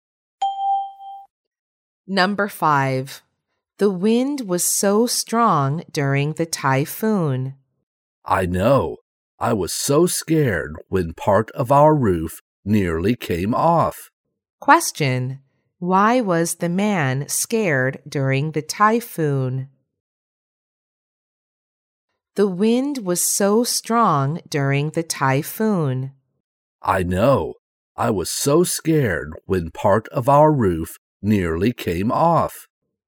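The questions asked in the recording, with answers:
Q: Why was the man scared during the typhoon?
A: Part of their roof nearly came off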